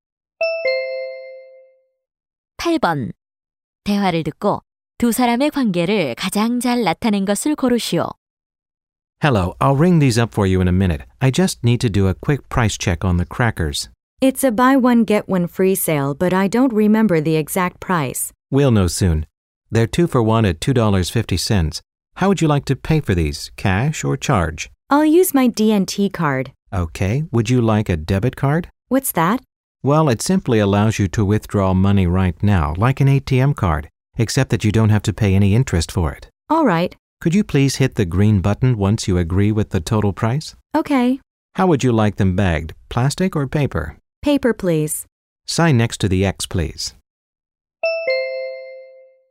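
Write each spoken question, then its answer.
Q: 대화를 듣고 두 사람의 관계를 가장 잘 나타낸 것을 고르시오.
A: 계산원 - 손님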